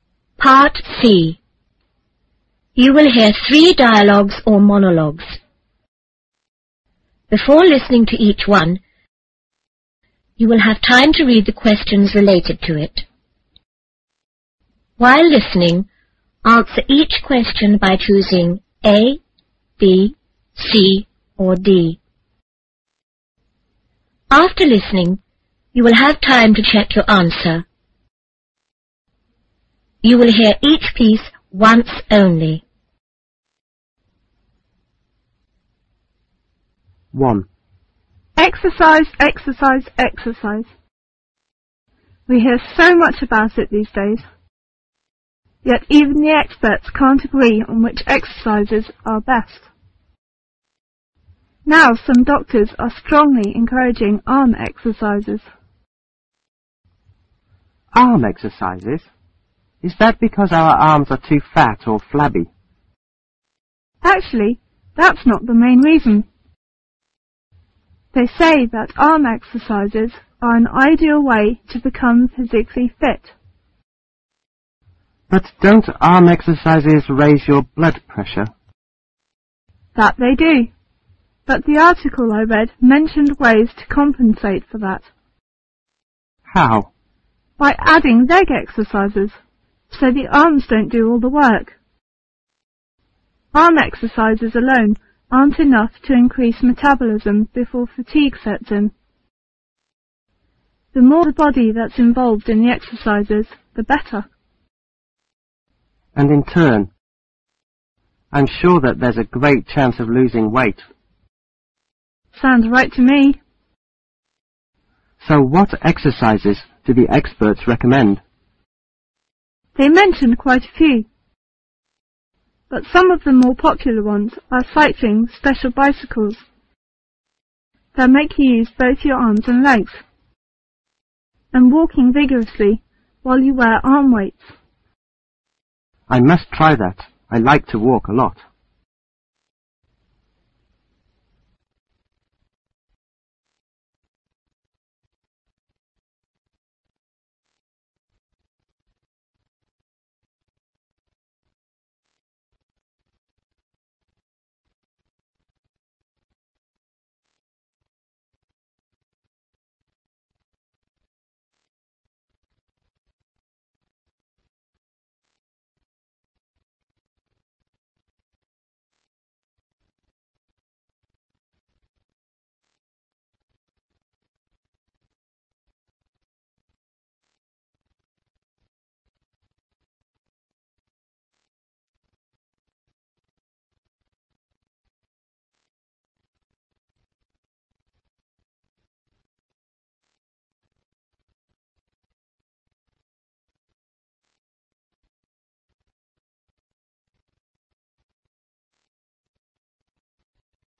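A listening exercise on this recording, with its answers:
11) According to the conversation,what is one problem with arm exercises?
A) They don't get rid of flabby arms.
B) They can damage arm muscles.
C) They are not acceptable to most people.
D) They can raise one's blood pressure.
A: They can raise one's blood pressure.

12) How did the woman obtain the information about arm exercises?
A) By talking to an expert.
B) By reading an article.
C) By attending an exercise class.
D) By listening to the radio.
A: By reading an article.

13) Which of the following exercises is suggested?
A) Wearing arm weights while you are swimming.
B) Jogging vigorously in one place for a long time.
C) Using bicycles that require you to use both your arms arid legs.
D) Walking slowly while swing your arms back and forth.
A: Using bicycles that require you to use both your arms arid legs.

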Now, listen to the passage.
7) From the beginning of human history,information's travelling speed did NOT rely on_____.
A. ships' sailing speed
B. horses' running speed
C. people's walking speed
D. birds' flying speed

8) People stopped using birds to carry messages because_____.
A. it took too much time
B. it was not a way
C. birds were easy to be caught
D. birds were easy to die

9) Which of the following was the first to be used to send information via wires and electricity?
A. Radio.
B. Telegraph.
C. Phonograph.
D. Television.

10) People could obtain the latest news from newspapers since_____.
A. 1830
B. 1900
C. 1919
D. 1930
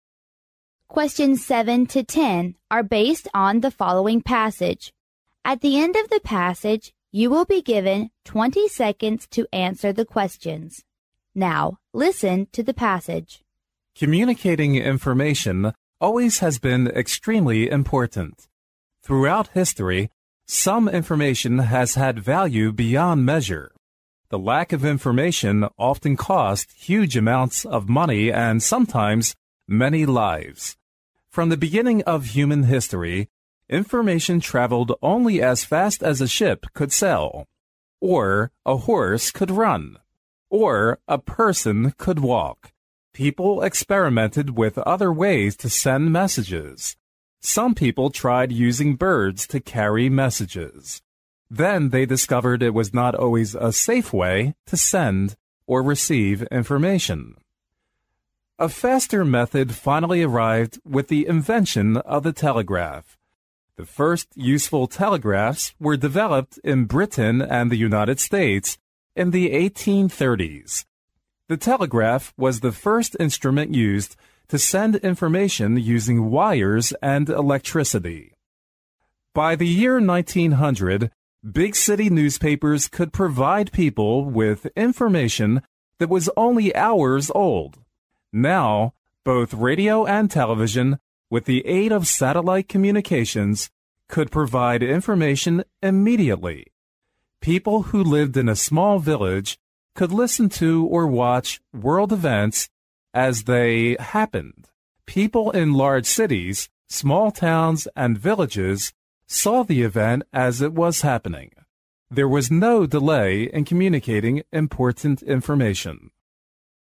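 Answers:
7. birds' flying speed
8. it was not a way
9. Telegraph.
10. 1900

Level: 英语四级

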